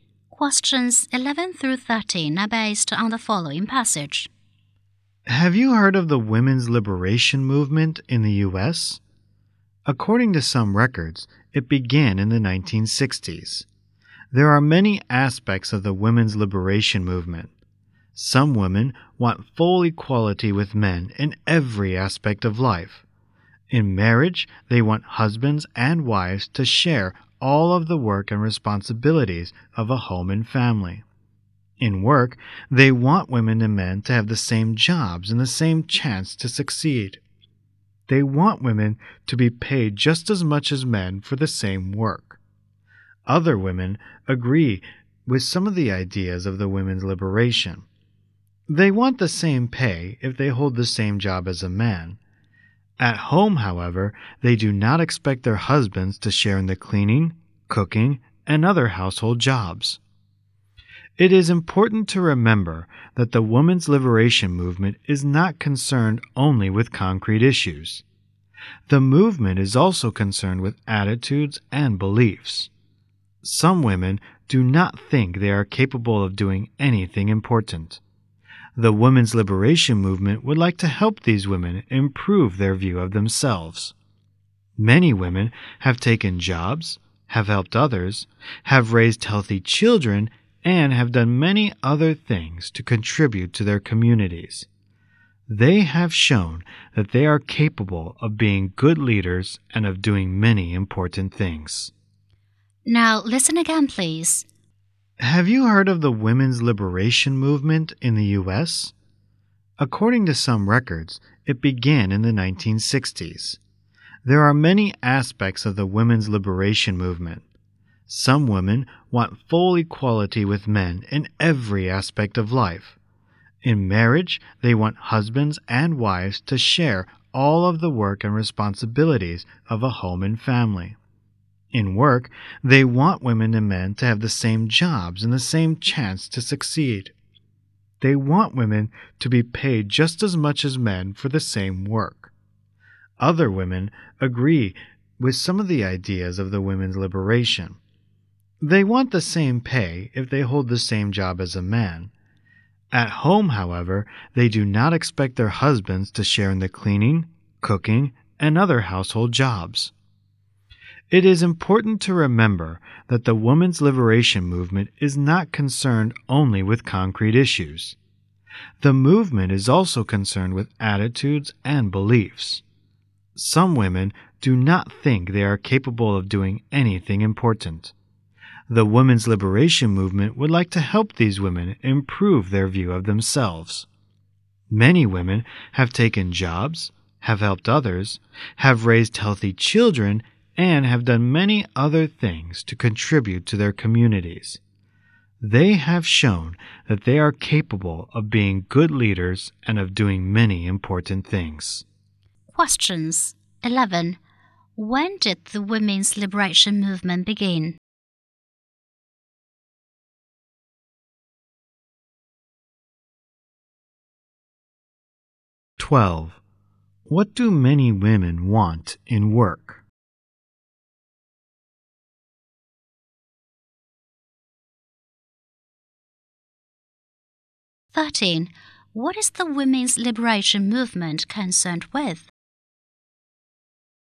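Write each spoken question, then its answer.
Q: When did the women's liberation movement begin?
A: In the 1960s.

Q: What do many women want in work?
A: The same jobs, the same chance to succeed and the same pay as men.

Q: What is the women's liberation movement concerned with?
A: Attitudes and beliefs as well as concrete issues.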